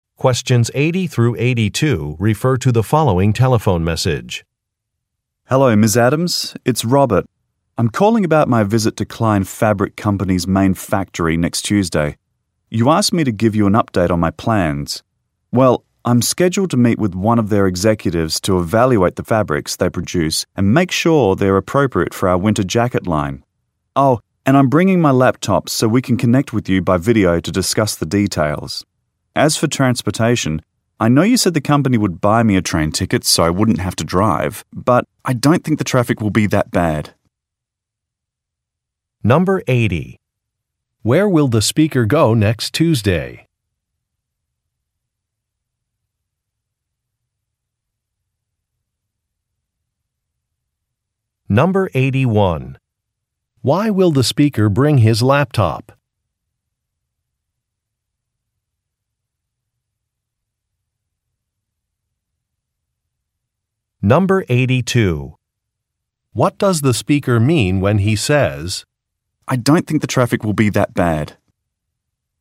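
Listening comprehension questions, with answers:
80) Where will the speaker go next Tuesday?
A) To a store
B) To a factory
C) To a hotel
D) To an airport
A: To a factory

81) Why will the speaker bring his laptop?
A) To try out some new software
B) To fix a technical problem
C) To conduct a video conference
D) To check competitors' prices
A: To conduct a video conference

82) What does the speaker mean when he says, "I don't think the traffic will be that bad"?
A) He plans to drive.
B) He expects to arrive early.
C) He does not need a map.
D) He wants to postpone a departure time.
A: He plans to drive.

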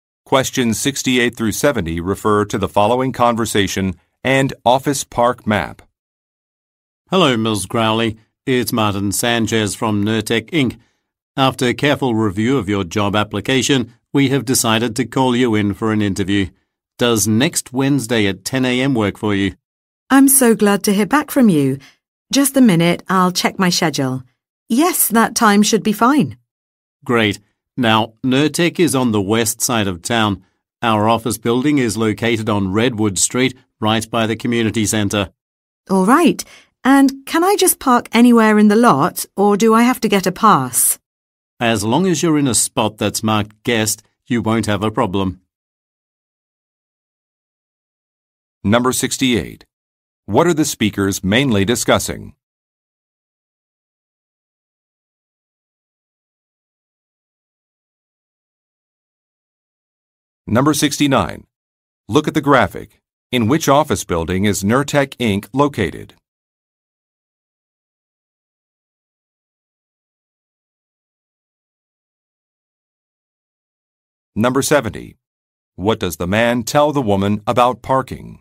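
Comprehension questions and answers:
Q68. What are the speakers mainly discussing?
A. A business opening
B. A job interview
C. A renovation project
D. A moving plan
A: A job interview

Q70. What does the man tell the woman about parking?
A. A parking space has been reserved for her.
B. A parking permit must be displayed.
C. She will need to pay cash for a parking space.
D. She should park in a guest spot.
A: She should park in a guest spot.

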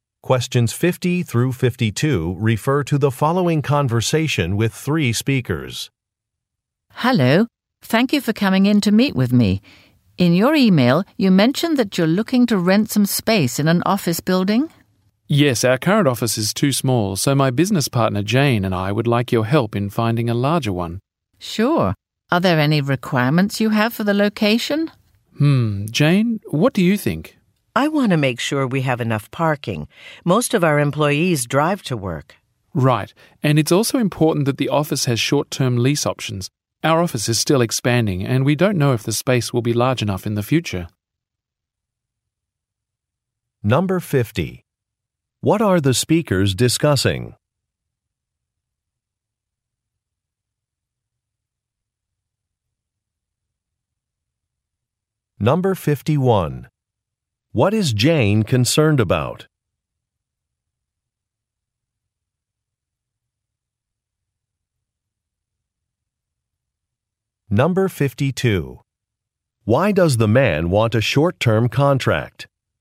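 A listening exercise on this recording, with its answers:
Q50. What are the speakers discussing?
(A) Renting some office space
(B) Reserving a banquet hall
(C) Purchasing a car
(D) Finding an apartment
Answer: Renting some office space

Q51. What is Jane concerned about?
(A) Access to wireless Internet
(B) The availability of parking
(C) The size of a budget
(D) The proximity to a city center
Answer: The availability of parking

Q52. Why does the man want a short-term contract?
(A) He needs to raise more money.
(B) He is moving to a new city.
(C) A company is growing.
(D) A business agreement may change.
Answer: A company is growing.

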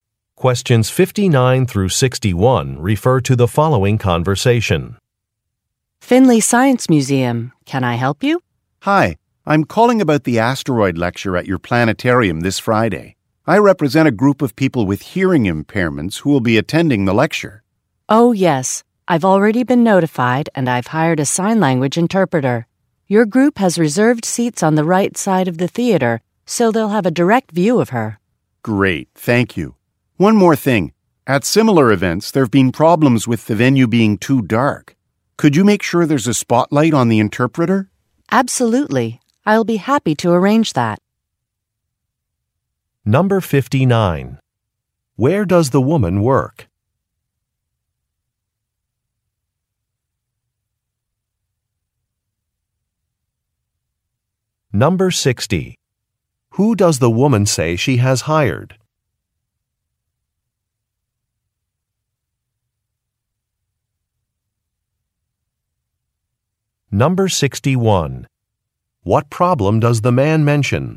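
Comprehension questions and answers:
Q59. Where does the woman work?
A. At a museum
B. At a movie theater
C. At a newspaper office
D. At a photography studio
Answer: At a museum

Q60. Who does the woman say she has hired?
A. An engineer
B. A musician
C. An interpreter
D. A scientist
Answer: An interpreter

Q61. What problem does the man mention?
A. Traffic noise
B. Late deliveries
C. Uncomfortable seating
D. Inadequate lighting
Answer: Inadequate lighting

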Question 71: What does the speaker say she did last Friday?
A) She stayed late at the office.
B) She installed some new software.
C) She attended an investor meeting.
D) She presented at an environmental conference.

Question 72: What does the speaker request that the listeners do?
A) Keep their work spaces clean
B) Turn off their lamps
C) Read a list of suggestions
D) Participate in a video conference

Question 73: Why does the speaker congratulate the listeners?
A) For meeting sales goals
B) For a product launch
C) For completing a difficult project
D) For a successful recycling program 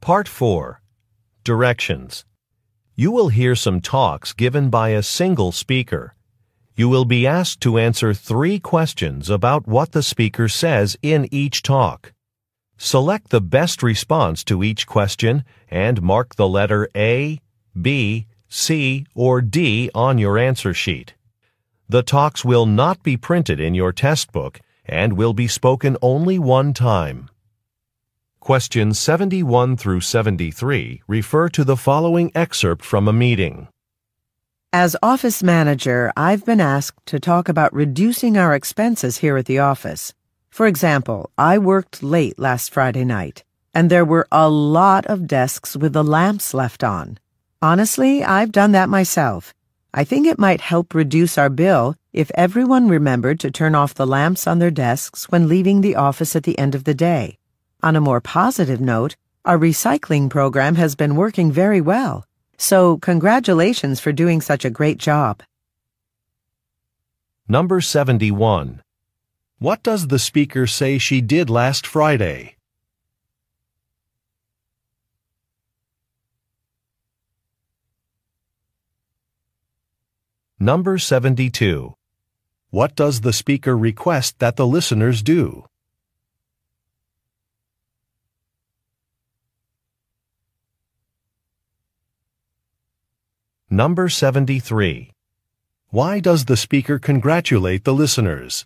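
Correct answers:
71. She stayed late at the office.
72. Turn off their lamps
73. For a successful recycling program

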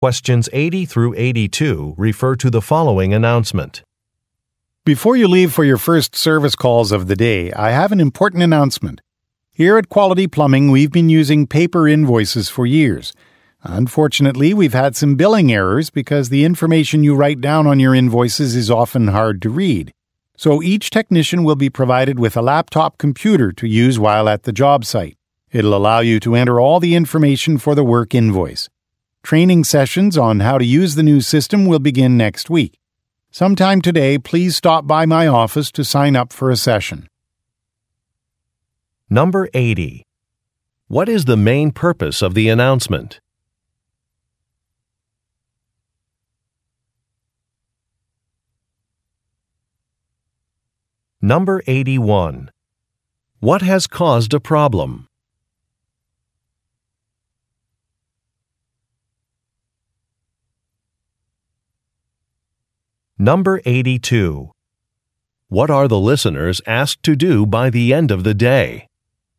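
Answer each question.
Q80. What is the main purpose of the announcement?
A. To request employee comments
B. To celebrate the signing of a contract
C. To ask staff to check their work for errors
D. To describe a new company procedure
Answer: To describe a new company procedure

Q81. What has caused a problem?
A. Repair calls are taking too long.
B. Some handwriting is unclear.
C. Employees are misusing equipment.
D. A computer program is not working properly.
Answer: Some handwriting is unclear.

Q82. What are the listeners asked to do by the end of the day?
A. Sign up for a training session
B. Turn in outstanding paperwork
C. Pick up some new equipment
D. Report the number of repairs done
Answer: Sign up for a training session

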